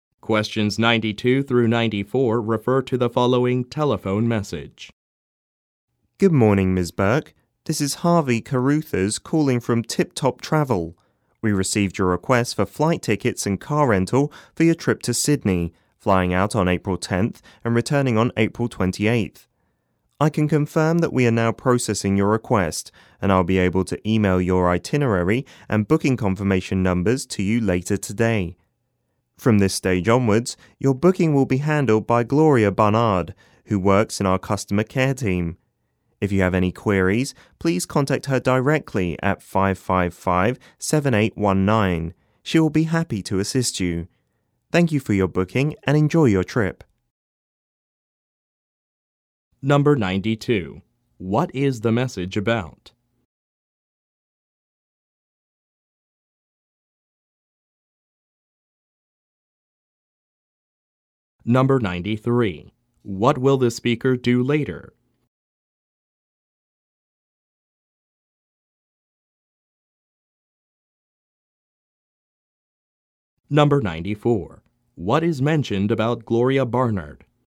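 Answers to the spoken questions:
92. A travel booking (flights and car rental) for a trip to Sydney
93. Email the itinerary and booking confirmation numbers
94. She will handle the booking; she works in customer care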